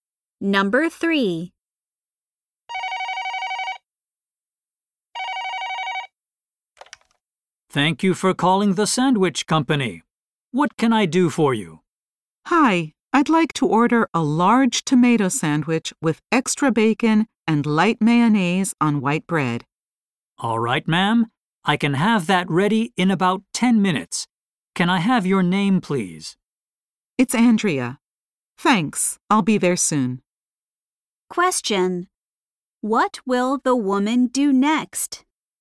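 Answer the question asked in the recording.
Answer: Go to pick up her sandwich.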